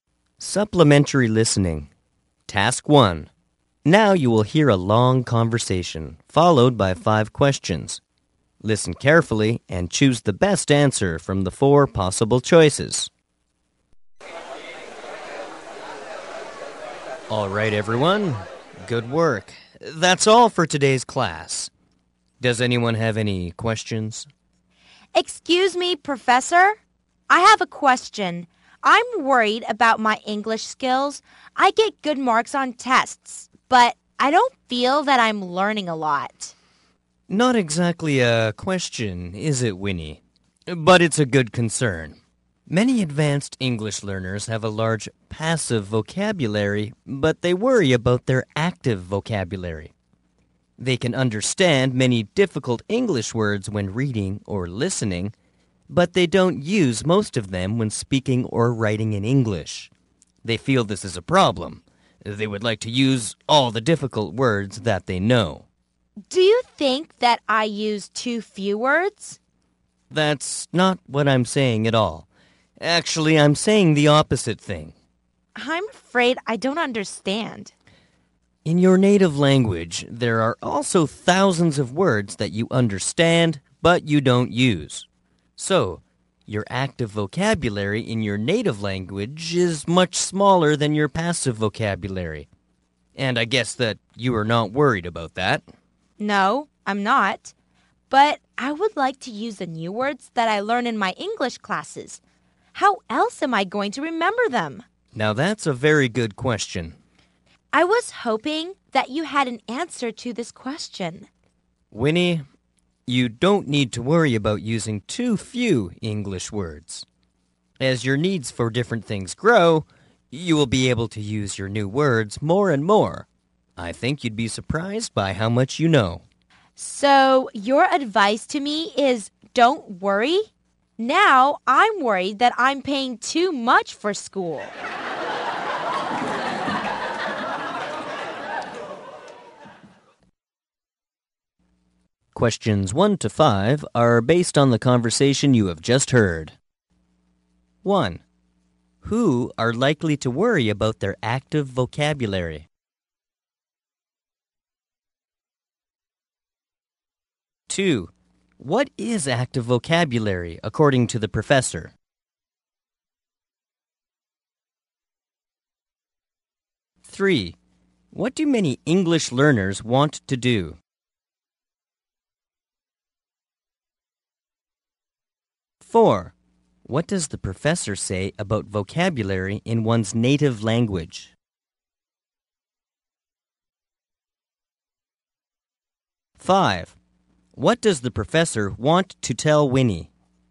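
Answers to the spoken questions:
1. Advanced English learners.
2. Words one uses when speaking or writing.
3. Use all the difficult words they know.
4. Active vocabulary is much smaller than passive vocabulary.
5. Not to worry about using too few English words.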